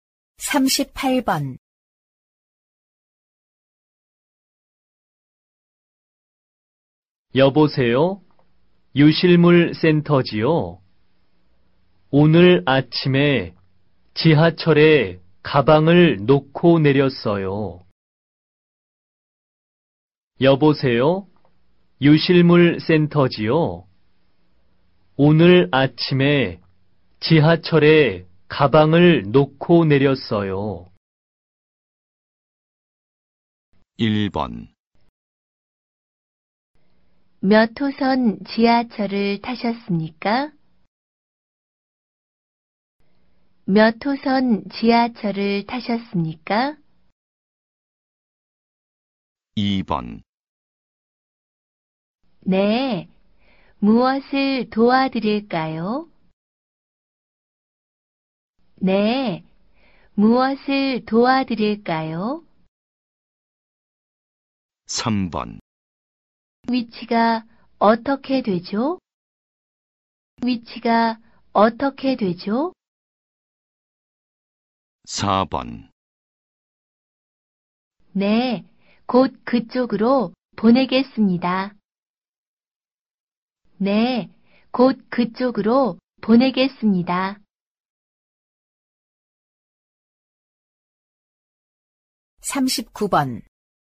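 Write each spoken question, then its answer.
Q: 여보세요? 유실물 센터지요? 오늘 아침에 지하철에 가방을 놓고 내렸어요.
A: 1: 몇 호선 지하철을 타셨습니까?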